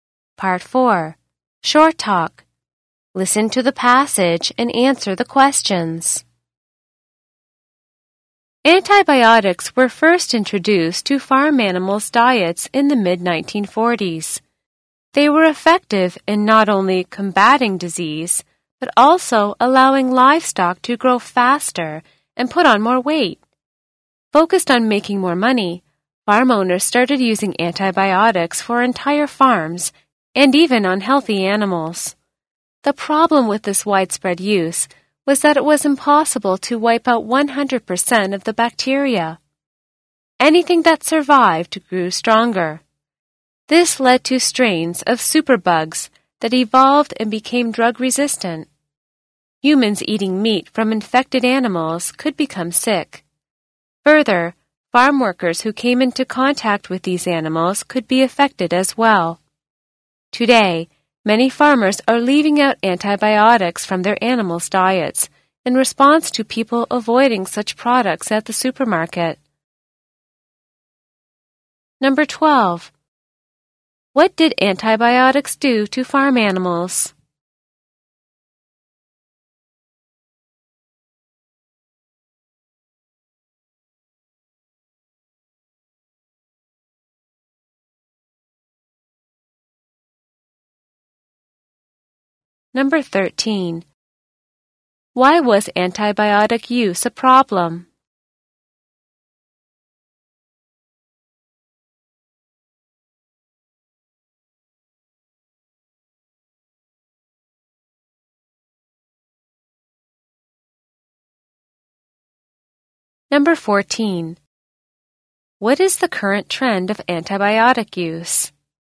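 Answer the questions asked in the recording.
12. They fought disease and made livestock grow faster and put on more weight.
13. Surviving bacteria grew stronger into drug-resistant superbugs that could make people sick.
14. Many farmers are leaving antibiotics out of their animals' diets.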